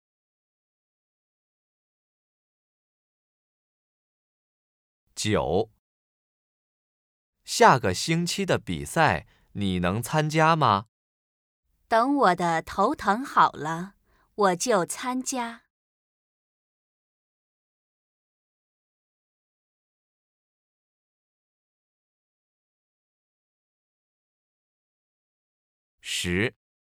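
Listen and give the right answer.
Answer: 头疼好了就参加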